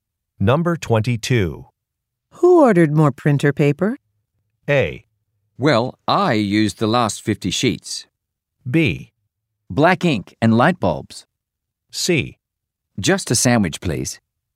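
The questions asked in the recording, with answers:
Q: Who ordered more printer paper?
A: A: Well, I used the last 50 sheets.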